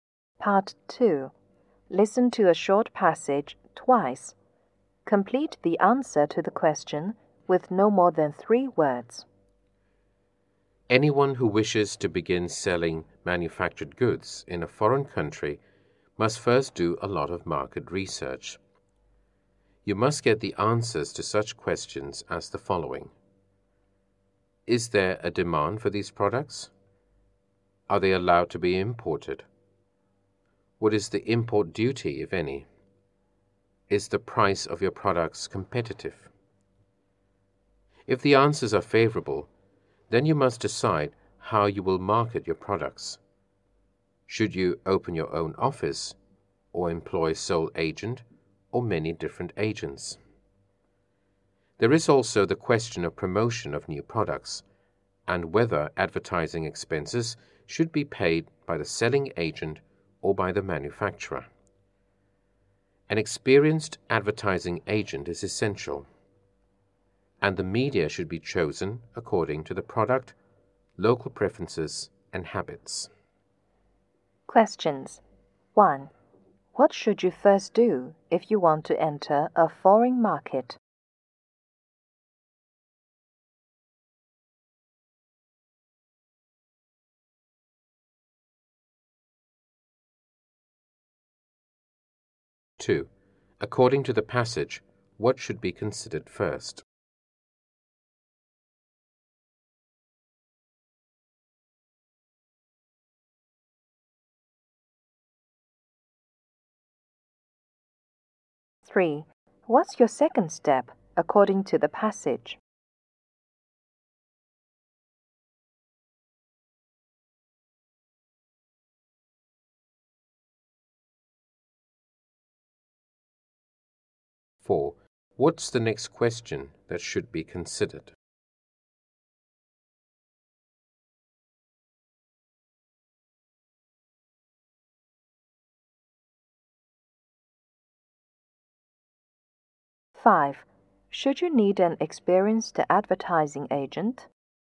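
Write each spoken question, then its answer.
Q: What should you first do if you want to enter a foreign market?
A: Do market research

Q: Should you need an experienced advertising agent?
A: Yes, it is essential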